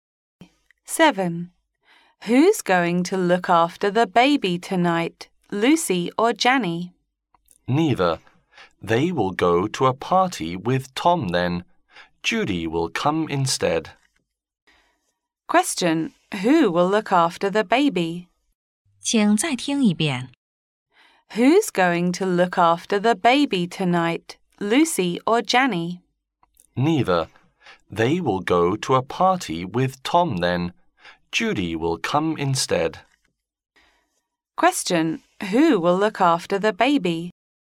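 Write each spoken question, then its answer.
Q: Question, who will look after the baby?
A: Judy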